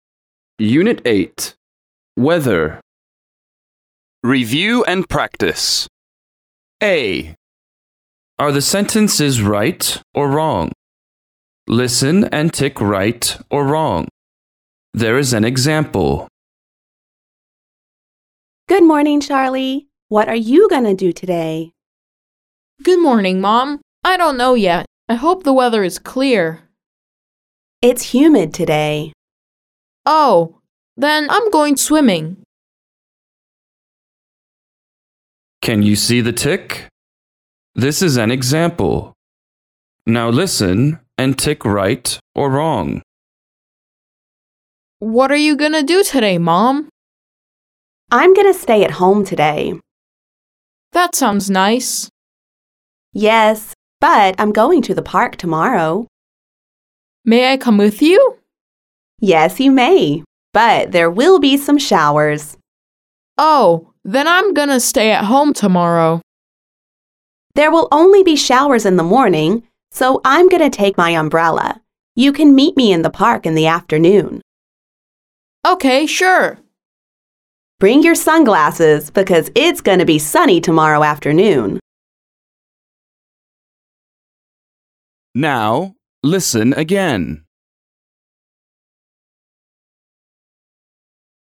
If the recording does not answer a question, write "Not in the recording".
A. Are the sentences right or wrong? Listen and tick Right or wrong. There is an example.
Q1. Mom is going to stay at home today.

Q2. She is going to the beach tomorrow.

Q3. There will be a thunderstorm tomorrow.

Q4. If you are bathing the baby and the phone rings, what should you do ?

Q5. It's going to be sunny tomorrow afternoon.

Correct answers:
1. Right
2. Wrong
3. Wrong
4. Not in the recording
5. Right

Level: lớp 5